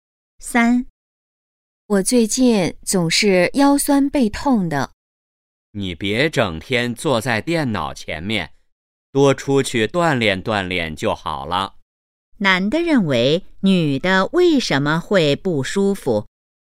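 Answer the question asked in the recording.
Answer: 整天坐在电脑前面,缺少锻炼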